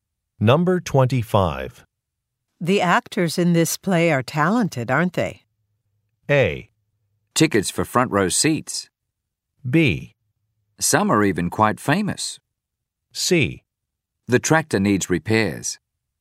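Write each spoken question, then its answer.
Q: The actors in this play are talented, aren't they?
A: B: Some are even quite famous.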